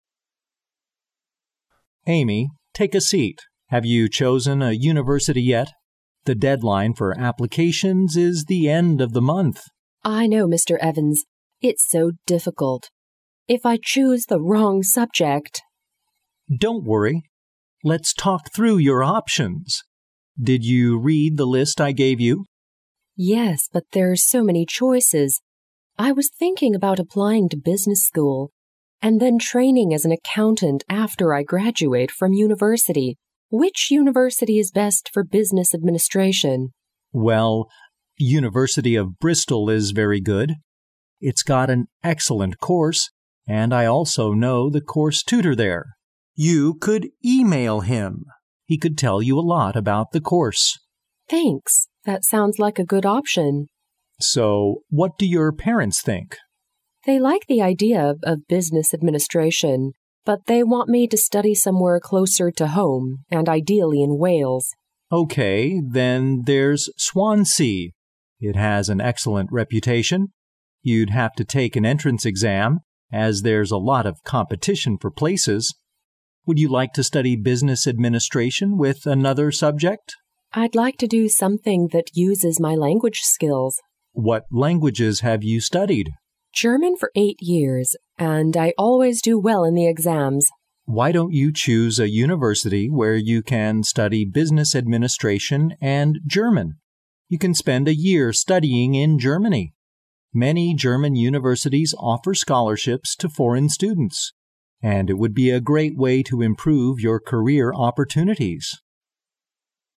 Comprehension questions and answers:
Listen to the conversation, mark each statement as either true (T) or false (F) according to your listening.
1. The deadline for applications is in three months.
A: 错

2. Mr. Evans doesn't think the University of Bristol has got a good course.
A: 错

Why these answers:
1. Mr. Evans问Amy是否做好了选大学的决定,因为截止日期就在本月底。故该判断错误。
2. 因为Amy问Mr. Evans哪个学校学商学好,Mr. Evans马上推荐了University of Bristol,并夸赞这所大学的课程很好,故该判断错误。

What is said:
[听力原文] M: Amy. Take a seat. Have you chosen a university yet? The deadline for applications is the end of the month. W: I know. Mr. Evans. It's so difficult! If I choose the wrong subject... M: Don't worry. Let's talk through your options. Did you read the list I gave you? W: Yes, but there're so many choices. I was thinking about applying to business school, and then training as an accountant after I graduate from university. Which university is best for business administration ? M: Well, University of Bristol is very good. It's got an excellent course, and I also know the course tutor there. You could e-mail him. He could tell you a lot about the course. W: Thanks. That sounds like a good option. M: So, what do your parents think? W: They like the idea of business administration, but they want me to study somewhere closer to home, and ideally in Wales. M: OK, then there's Swansea. It has an excellent reputation. You'd have to take an entrance ex- am, as there's a lot of competition for places. Would you like to study business administration with another subject? W: I'd like to do something that uses my language skills. M: What languages have you studied? W: German for eight years, and I always do well in the exams. M: Why don't you choose a university where you can study business administration and German? You can spend a year studying in Germany. Many German universities offer scholarships to foreign students. And it would be a great way to improve your career opportunities.